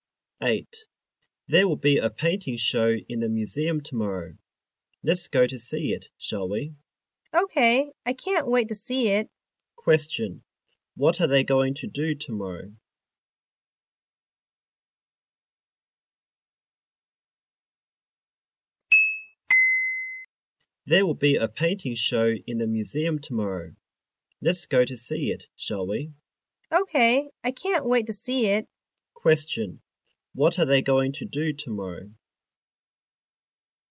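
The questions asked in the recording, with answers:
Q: Question. What are they going to do tomorrow?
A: Go to see a painting show in the museum.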